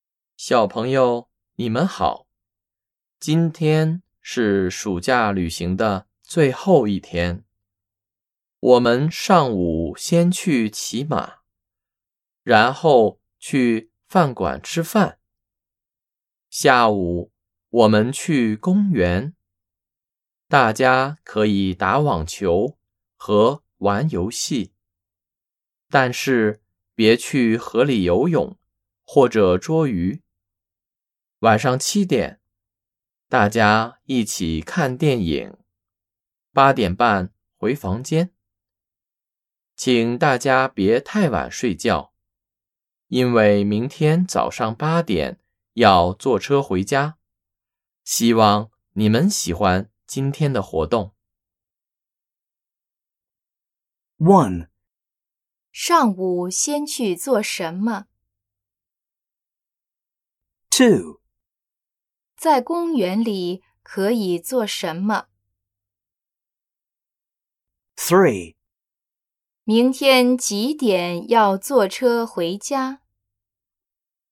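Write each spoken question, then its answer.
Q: 上午先去做什么?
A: 骑马

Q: 在公园里可以做什么?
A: 打网球和玩游戏

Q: 明天几点要坐车回家?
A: 早上八点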